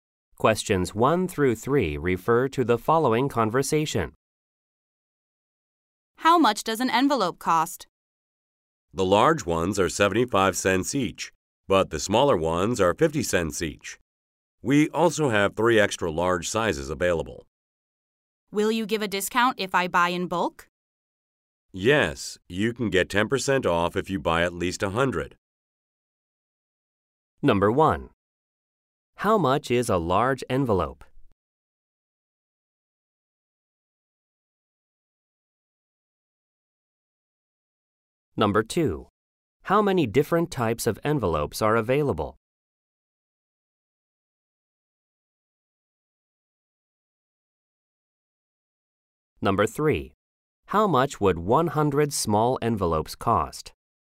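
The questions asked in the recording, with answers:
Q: How much is a large envelope?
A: 75 cents

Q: How much would 100 small envelopes cost?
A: $45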